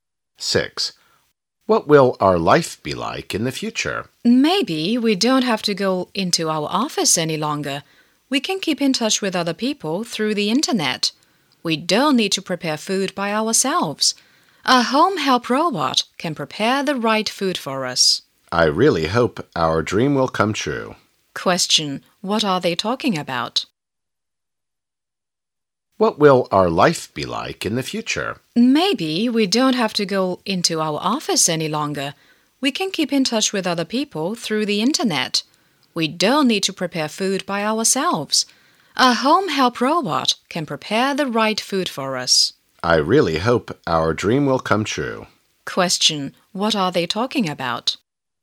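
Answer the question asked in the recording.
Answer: Life in the future.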